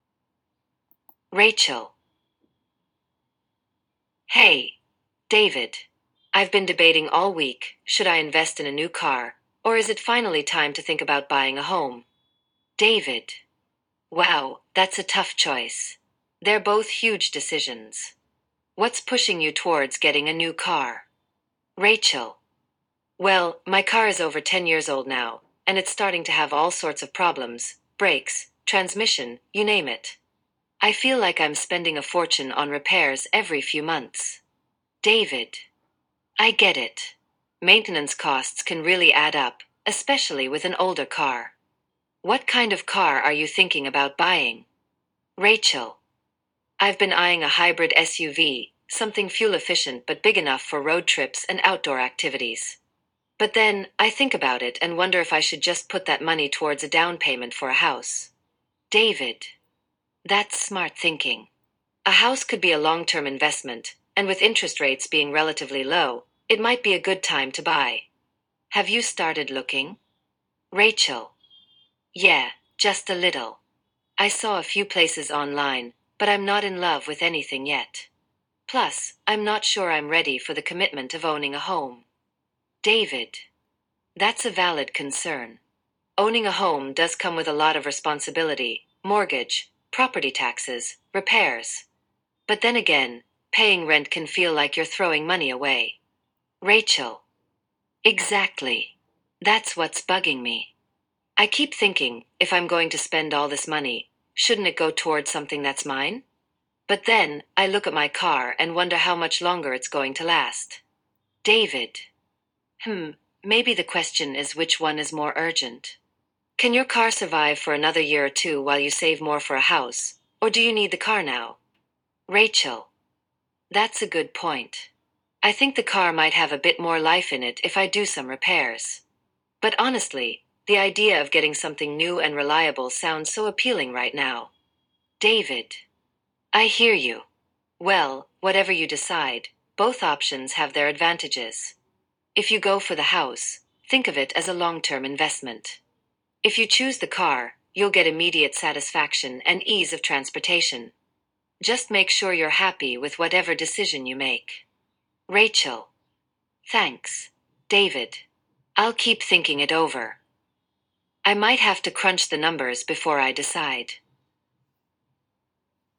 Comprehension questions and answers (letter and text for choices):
You will listen to a conversation between two people discussing whether to buy a car or a home. After the audio, you will answer 10 multiple-choice questions based on the details of their conversation. Each question has four answer options. Choose the option that best fits what you heard.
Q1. What issue is Rachel facing with her current car?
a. It's too small for her needs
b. It's expensive to repair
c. It doesn't get good gas mileage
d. It was recently in an accident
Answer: b. It's expensive to repair

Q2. What type of car is Rachel considering buying?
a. A hybrid SUV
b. A luxury sedan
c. A compact electric car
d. A sports car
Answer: a. A hybrid SUV

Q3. Why is Rachel considering buying a home?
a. She wants to stop paying rent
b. She found a house she loves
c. She needs more space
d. Interest rates are high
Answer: a. She wants to stop paying rent

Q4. What concern does Rachel have about buying a home?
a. She doesn't have enough savings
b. She isn't sure she's ready for the responsibility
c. She can't get a loan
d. She prefers renting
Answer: b. She isn't sure she's ready for the responsibility

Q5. What does David mention as a responsibility of owning a home?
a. Insurance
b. Decorating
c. Property taxes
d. Renovation costs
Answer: c. Property taxes

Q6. What is one benefit of buying a home, according to David?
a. Low property maintenance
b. It's a short-term commitment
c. It can be a long-term investment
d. It's cheaper than renting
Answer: c. It can be a long-term investment

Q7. What does Rachel think about paying rent?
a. It's affordable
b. It's like throwing money away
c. It's easier than owning a home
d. It allows her to save for a car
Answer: b. It's like throwing money away

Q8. What does David suggest Rachel consider before deciding?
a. Whether the car is urgent or not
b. Whether she has enough savings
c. Whether she likes the neighborhood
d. Whether her job is secure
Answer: a. Whether the car is urgent or not

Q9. What is Rachel's immediate feeling about getting a new car?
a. She feels excited about it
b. She prefers saving for a house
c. She's unsure about which model to choose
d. She thinks it's a bad idea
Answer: a. She feels excited about it

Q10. What is Rachel's final decision at the end of the conversation?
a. She decides to buy a car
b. She decides to buy a house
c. She hasn't decided yet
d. She chooses to rent a new place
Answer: c. She hasn't decided yet

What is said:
[Person A: Rachel]
Hey, David! I've been debating all week—should I invest in a new car, or is it finally time to think about buying a home?
[Person B: David]
Wow, that's a tough choice! They're both huge decisions. What's pushing you towards getting a new car?
[Rachel]
Well, my car is over 10 years old now, and it's starting to have all sorts of problems—brakes, transmission, you name it. I feel like I'm spending a fortune on repairs every few months.
[David]
I get it. Maintenance costs can really add up, especially with an older car. What kind of car are you thinking about buying?
[Rachel]
I've been eyeing a hybrid SUV—something fuel-efficient but big enough for road trips and outdoor activities. But then, I think about it and wonder if I should just put that money towards a down payment for a house.
[David]
That's smart thinking. A house could be a long-term investment, and with interest rates being relatively low, it might be a good time to buy. Have you started looking?
[Rachel]
Yeah, just a little. I saw a few places online, but I'm not in love with anything yet. Plus, I'm not sure I'm ready for the commitment of owning a home.
[David]
That's a valid concern. Owning a home does come with a lot of responsibility—mortgage, property taxes, repairs. But then again, paying rent can feel like you're throwing money away.
[Rachel]
Exactly! That's what's bugging me. I keep thinking, if I'm going to spend all this money, shouldn't it go toward something that's mine? But then, I look at my car and wonder how much longer it's going to last.
[David]
Hmm, maybe the question is which one is more urgent? Can your car survive for another year or two while you save more for a house, or do you need the car now?
[Rachel]
That's a good point. I think the car might have a bit more life in it if I do some repairs. But honestly, the idea of getting something new and reliable sounds so appealing right now.
[David]
I hear you. Well, whatever you decide, both options have their advantages. If you go for the house, think of it as a long-term investment. If you choose the car, you'll get immediate satisfaction and ease of transportation. Just make sure you're happy with whatever decision you make.
[Rachel]
Thanks, David. I'll keep thinking it over. I might have to crunch the numbers before I decide.